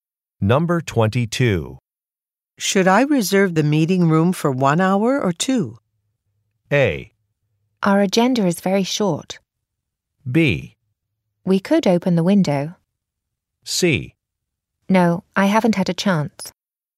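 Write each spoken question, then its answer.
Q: Should I reserve the meeting room for 1 hour or two?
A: A: Our agenda is very short.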